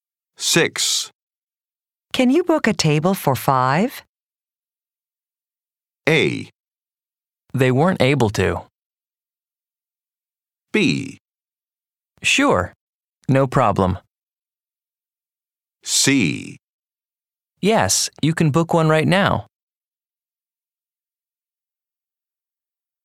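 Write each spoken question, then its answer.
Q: Can you book a table for 5?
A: B: Sure, no problem.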